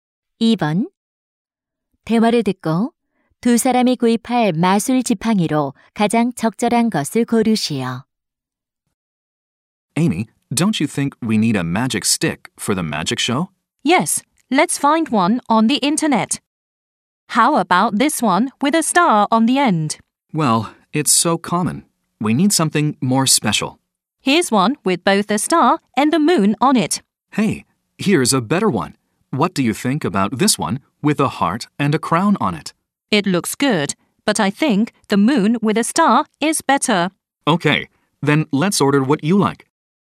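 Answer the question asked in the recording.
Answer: 별과 달이 달린 지팡이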